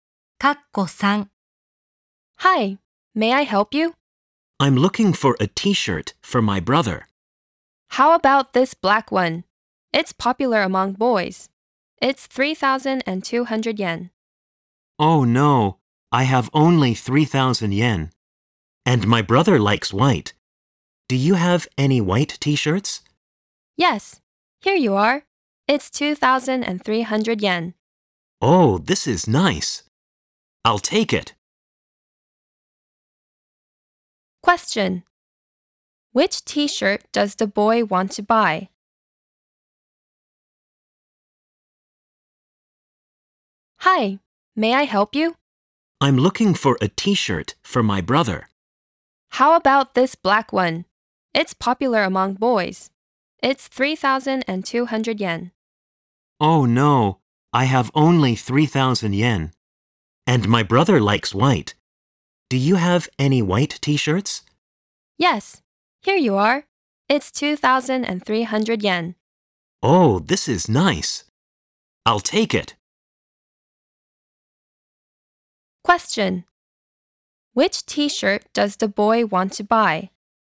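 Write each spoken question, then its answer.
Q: Which t-shirt does the boy want to buy?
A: The white T-shirt for 2,300 yen.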